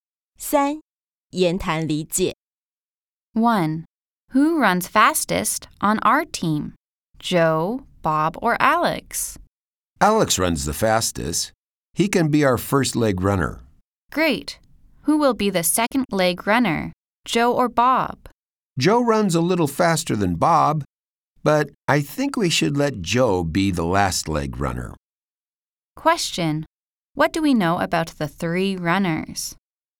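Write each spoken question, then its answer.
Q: What do we know about the three runners?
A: Alex runs the fastest, Joe is faster than Bob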